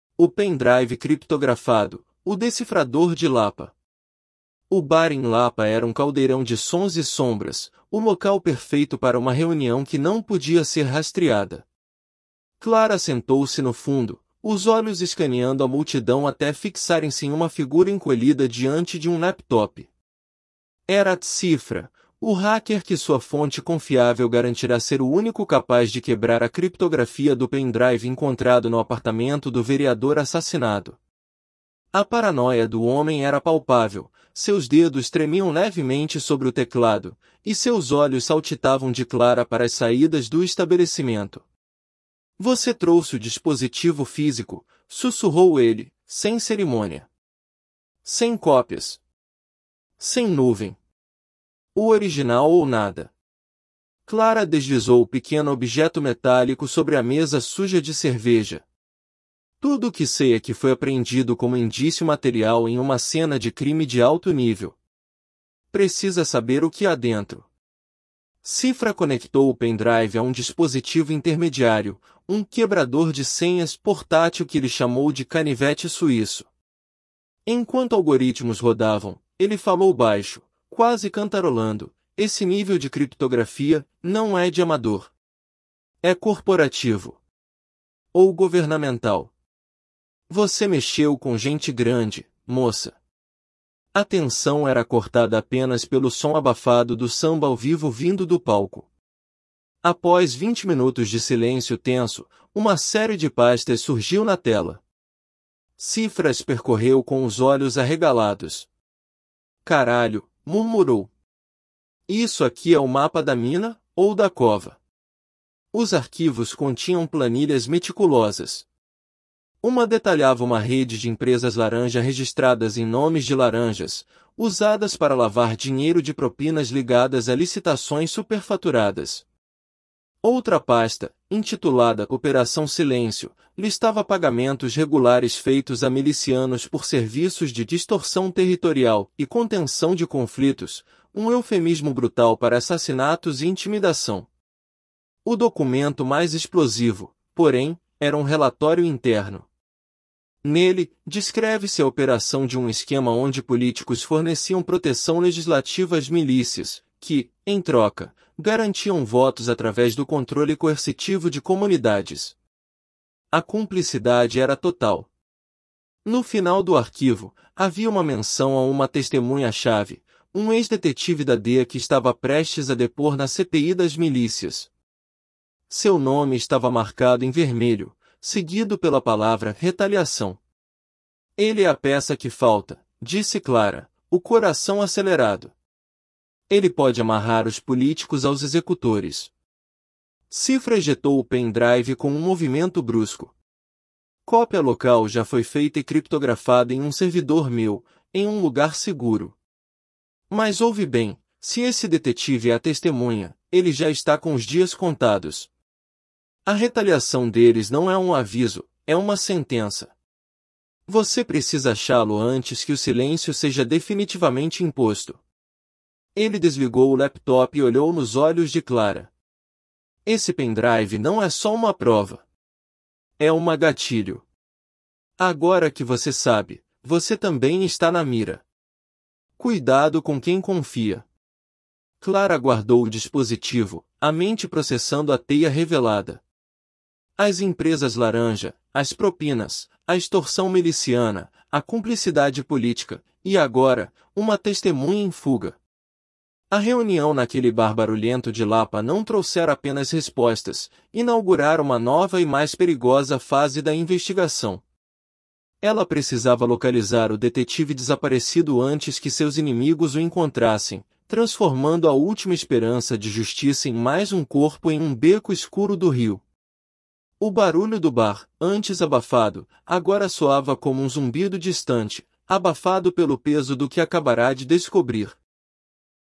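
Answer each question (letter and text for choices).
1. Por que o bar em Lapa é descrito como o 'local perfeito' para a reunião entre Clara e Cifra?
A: Porque era um caldeirão de sons e sombras, e a reunião não podia ser rastreada.

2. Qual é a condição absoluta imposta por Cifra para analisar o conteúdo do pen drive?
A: O dispositivo físico original, sem cópias e sem nuvem.

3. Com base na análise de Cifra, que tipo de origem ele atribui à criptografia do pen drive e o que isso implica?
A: Corporativa ou governamental, ou seja, Clara mexeu com gente grande.

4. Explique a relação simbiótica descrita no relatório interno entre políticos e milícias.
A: Os políticos davam proteção legislativa às milícias, e elas garantiam votos por meio do controle coercitivo das comunidades.

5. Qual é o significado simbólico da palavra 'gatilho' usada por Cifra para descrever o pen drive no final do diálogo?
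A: O pen drive não é só uma prova, mas algo que desencadeia perigo: quem sabe do conteúdo fica na mira.

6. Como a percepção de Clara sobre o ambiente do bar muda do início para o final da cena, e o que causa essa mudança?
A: No início o bar é um caldeirão de sons; no fim o barulho soa como um zumbido distante, abafado pelo peso do que ela descobriu.

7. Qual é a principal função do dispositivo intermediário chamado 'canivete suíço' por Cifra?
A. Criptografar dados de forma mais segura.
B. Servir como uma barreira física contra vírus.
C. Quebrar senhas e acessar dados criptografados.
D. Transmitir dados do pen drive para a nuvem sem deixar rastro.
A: C. Quebrar senhas e acessar dados criptografados.

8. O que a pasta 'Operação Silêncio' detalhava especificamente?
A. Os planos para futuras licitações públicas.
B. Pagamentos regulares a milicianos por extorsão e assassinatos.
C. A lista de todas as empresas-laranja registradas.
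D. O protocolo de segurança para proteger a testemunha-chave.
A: B. Pagamentos regulares a milicianos por extorsão e assassinatos.

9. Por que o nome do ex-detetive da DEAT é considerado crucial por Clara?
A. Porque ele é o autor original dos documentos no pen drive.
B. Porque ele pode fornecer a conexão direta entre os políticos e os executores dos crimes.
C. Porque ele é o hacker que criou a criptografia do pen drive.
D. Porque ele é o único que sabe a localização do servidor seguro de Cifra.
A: B. Porque ele pode fornecer a conexão direta entre os políticos e os executores dos crimes.

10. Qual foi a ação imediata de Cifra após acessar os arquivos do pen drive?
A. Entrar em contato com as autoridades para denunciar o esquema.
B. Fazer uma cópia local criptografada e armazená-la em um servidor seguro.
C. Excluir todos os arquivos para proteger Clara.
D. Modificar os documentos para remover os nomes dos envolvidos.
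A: B. Fazer uma cópia local criptografada e armazená-la em um servidor seguro.

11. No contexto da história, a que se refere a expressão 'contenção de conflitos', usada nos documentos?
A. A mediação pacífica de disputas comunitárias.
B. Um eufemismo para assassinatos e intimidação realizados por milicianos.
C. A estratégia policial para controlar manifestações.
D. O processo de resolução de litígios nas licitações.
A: B. Um eufemismo para assassinatos e intimidação realizados por milicianos.

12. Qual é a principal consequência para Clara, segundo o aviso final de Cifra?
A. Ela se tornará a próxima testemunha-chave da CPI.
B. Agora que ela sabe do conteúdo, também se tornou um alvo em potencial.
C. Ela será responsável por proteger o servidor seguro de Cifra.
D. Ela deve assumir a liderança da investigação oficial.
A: B. Agora que ela sabe do conteúdo, também se tornou um alvo em potencial.

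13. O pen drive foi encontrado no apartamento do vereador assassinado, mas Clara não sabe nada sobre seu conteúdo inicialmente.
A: Verdadeiro

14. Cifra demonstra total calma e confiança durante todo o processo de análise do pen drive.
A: Falso

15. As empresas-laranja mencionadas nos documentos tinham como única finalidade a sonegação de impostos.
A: Falso

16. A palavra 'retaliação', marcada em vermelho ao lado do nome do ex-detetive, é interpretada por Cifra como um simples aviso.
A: Falso

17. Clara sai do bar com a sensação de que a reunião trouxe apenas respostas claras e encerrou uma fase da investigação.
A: Falso

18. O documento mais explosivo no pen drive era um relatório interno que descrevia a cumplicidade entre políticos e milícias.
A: Verdadeiro

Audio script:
O Pen Drive Criptografado: O Decifrador de Lapa – TEST
O bar em Lapa era um caldeirão de sons e sombras, o local perfeito para uma reunião que não podia ser rastreada. 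Clara sentou-se no fundo, os olhos escaneando a multidão até fixarem-se em uma figura encolhida diante de um laptop. Era 'Cifra', o hacker que sua fonte confiável garantira ser o único capaz de quebrar a criptografia do pen drive encontrado no apartamento do vereador assassinado. A paranoia do homem era palpável; seus dedos tremiam levemente sobre o teclado, e seus olhos saltitavam de Clara para as saídas do estabelecimento. 'Você trouxe o dispositivo físico?', sussurrou ele, sem cerimônia. 'Sem cópias. Sem nuvem. O original ou nada.'
Clara deslizou o pequeno objeto metálico sobre a mesa suja de cerveja. 'Tudo que sei é que foi apreendido como indício material em uma cena de crime de alto nível. Precisa saber o que há dentro.' Cifra conectou o pen drive a um dispositivo intermediário, um 'quebrador de senhas' portátil que ele chamou de 'canivete suíço'. Enquanto algoritmos rodavam, ele falou baixo, quase cantarolando: 'Esse nível de criptografia... 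não é de amador. É corporativo. Ou governamental. Você mexeu com gente grande, moça.' A tensão era cortada apenas pelo som abafado do samba ao vivo vindo do palco.
Após vinte minutos de silêncio tenso, uma série de pastas surgiu na tela. Cifra as percorreu com os olhos arregalados. 'Caralho', murmurou. 'Isso aqui é o mapa da mina... ou da cova.' Os arquivos continham planilhas meticulosas. Uma detalhava uma rede de empresas-laranja registradas em nomes de laranjas, usadas para lavar dinheiro de propinas ligadas a licitações superfaturadas. Outra pasta, intitulada 'Operação Silêncio', listava pagamentos regulares feitos a milicianos por serviços de 'extorsão territorial' e 'contenção de conflitos' – um eufemismo brutal para assassinatos e intimidação.
O documento mais explosivo, porém, era um relatório interno. Nele, descreve-se a operação de um esquema onde políticos forneciam proteção legislativa às milícias, que, em troca, garantiam votos através do controle coercitivo de comunidades. 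A cumplicidade era total. No final do arquivo, havia uma menção a uma testemunha-chave, um ex-detetive da DEAT que estava prestes a depor na CPI das Milícias. Seu nome estava marcado em vermelho, seguido pela palavra 'retaliação'. 'Ele é a peça que falta', disse Clara, o coração acelerado. 'Ele pode amarrar os políticos aos executores.'
Cifra ejetou o pen drive com um movimento brusco. 'Cópia local já foi feita e criptografada em um servidor meu, em um lugar seguro. Mas ouve bem: se esse detetive é a testemunha, ele já está com os dias contados. A retaliação deles não é um aviso; é uma sentença. Você precisa achá-lo antes que o silêncio seja definitivamente imposto.' Ele desligou o laptop e olhou nos olhos de Clara. 'Esse pen drive não é só uma prova. É uma gatilho. Agora que você sabe, você também está na mira. Cuidado com quem confia.'
Clara guardou o dispositivo, a mente processando a teia revelada. 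As empresas-laranja, as propinas, a extorsão miliciana, a cumplicidade política... e agora, uma testemunha em fuga. A reunião naquele bar barulhento de Lapa não trouxera apenas respostas; inaugurara uma nova e mais perigosa fase da investigação. Ela precisava localizar o detetive desaparecido antes que seus inimigos o encontrassem, transformando a última esperança de justiça em mais um corpo em um beco escuro do Rio. O barulho do bar, antes abafado, agora soava como um zumbido distante, abafado pelo peso do que acabara de descobrir.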